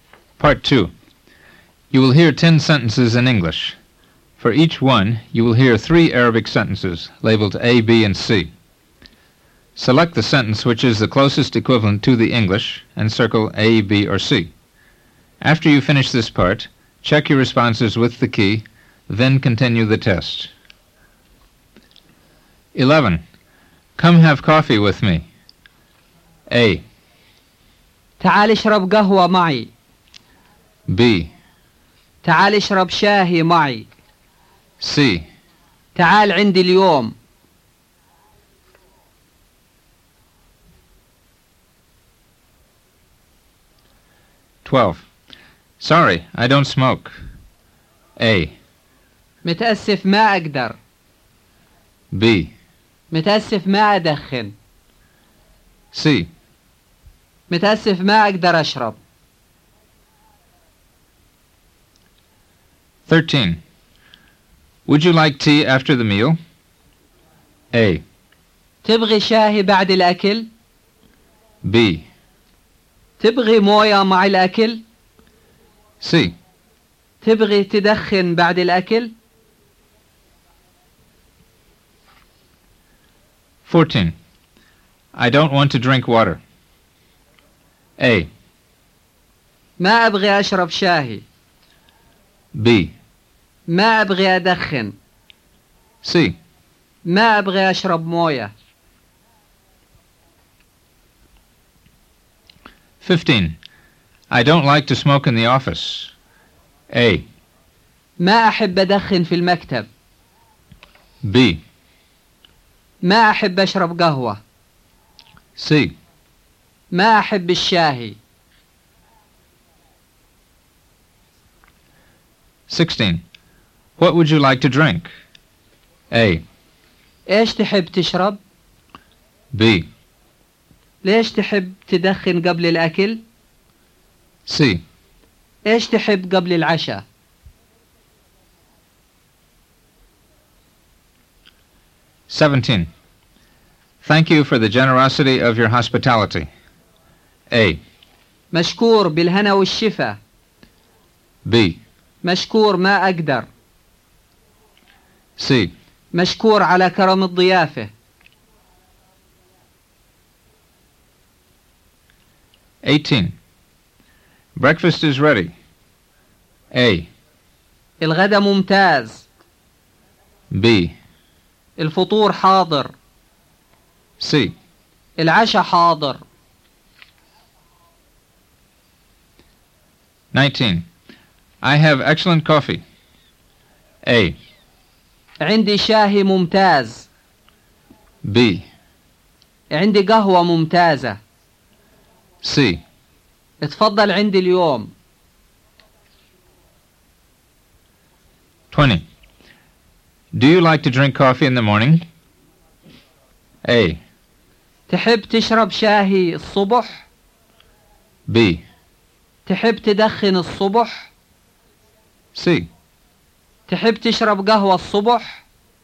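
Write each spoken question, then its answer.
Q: Come have coffee with me.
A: A: تعال اشرب قهوة معي.

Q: Sorry, I don't smoke.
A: B: متأسف ما أدخن.

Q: Would you like tea after the meal?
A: A: تبغي شاهي بعد الأكل؟

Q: I don't want to drink water.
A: C: ما أبغي أشرب موية.

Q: I don't like to smoke in the office.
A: A: ما أحب أدخن في المكتب.

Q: What would you like to drink?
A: A: إيش تحب تشرب؟

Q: Thank you for the generosity of your hospitality.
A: C: مشكور على كرم الضيافة.

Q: Breakfast is ready.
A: B: الفطور حاضر.

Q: I have excellent coffee.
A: B: عندي قهوة ممتازة.

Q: Do you like to drink coffee in the morning?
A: C: تحب تشرب قهوة الصبح؟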